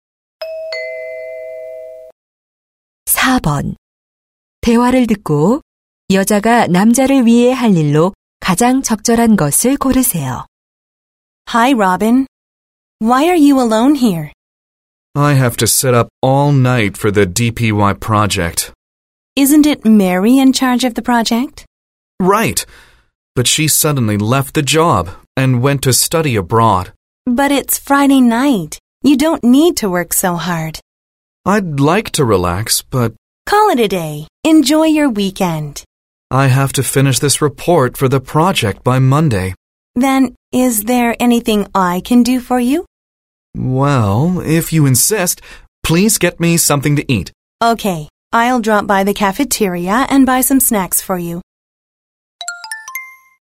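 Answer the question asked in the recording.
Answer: 간식 사다 주기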